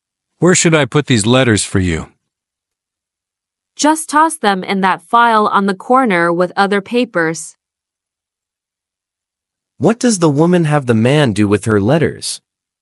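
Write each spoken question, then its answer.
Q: What does the woman have the man do with her letters?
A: Put them in the file on the corner with other papers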